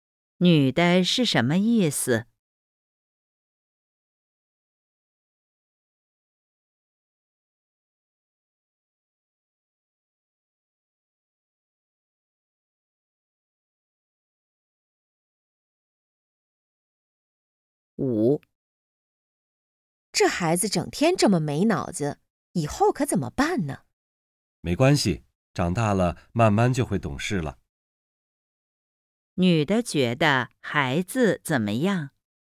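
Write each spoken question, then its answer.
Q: 女的觉得孩子怎么样?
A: 长大了慢慢就会懂事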